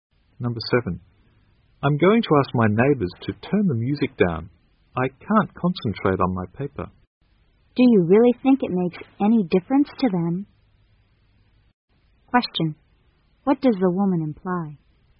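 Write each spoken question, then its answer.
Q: what does the woman imply?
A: The neighbors probably won't turn the music down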